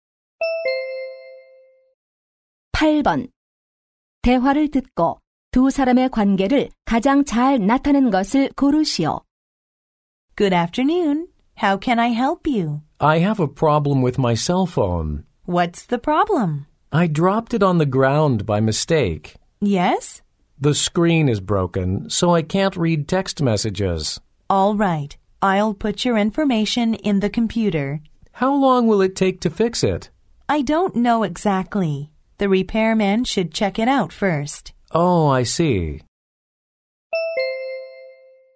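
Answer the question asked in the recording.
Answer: 휴대전화 수리점 직원과 고객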